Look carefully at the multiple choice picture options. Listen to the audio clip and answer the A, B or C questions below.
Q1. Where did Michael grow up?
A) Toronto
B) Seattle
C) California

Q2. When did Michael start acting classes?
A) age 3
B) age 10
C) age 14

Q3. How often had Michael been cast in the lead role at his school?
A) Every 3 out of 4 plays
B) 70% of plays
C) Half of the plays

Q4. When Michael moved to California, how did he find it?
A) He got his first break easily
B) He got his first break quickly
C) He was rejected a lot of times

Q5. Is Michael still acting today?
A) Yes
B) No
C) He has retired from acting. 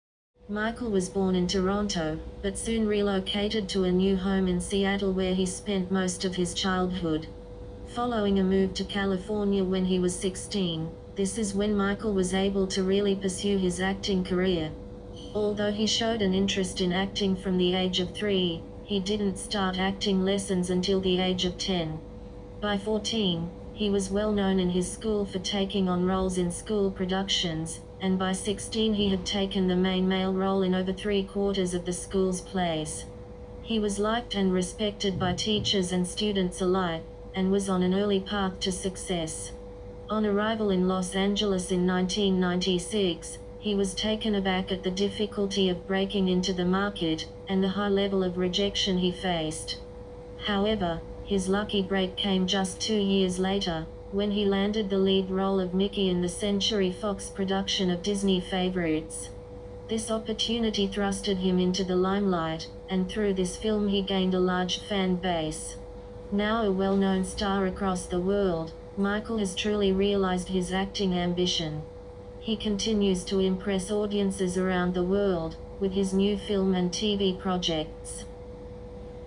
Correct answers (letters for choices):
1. B
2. B
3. A
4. C
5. A

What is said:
Michael was born in Toronto, but soon relocated to a new home in Seattle where he spent most of his childhood. Following a move to California when he was 16, this is when Michael was able to really pursue his acting career. Although he showed an interest in acting from the age of 3, he didn't start acting lessons until the age of 10. By 14, he was well-known in his school for taking on roles in school productions and by 16 he had taken the main male role in over three-quarters of the schools' plays. He was liked and respected by teachers and students alike and was on an early path to success.
On arrival in Los Angeles in 1996, he was taken aback at the difficulty of breaking into the market and the high level of rejection he faced. However, his lucky break came just two years later when he landed the lead role of 'Mickey' in the Century Fox production of Disney Favourites. This opportunity thrusted him into the limelight and through this film he gained a large fan base. Now a well-known star across the world, Michael has truly realised his acting ambition. He continues to impress audiences around the world with his new film and TV projects.